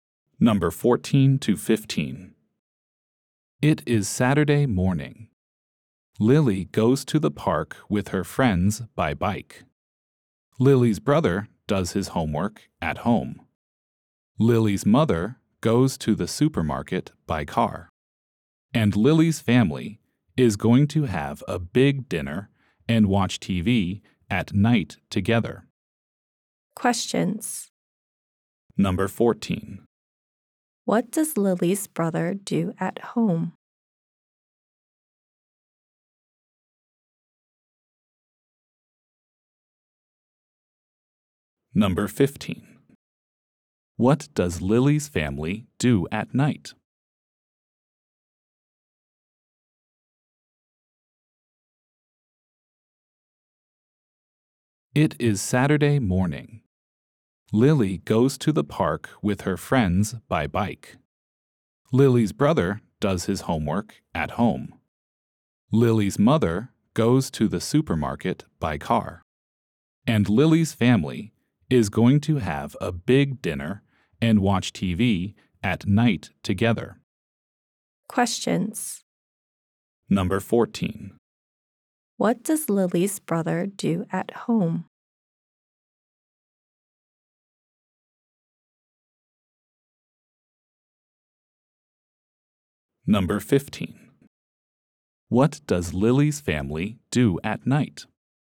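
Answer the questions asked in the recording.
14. He does his homework.
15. They have a big dinner and watch TV together.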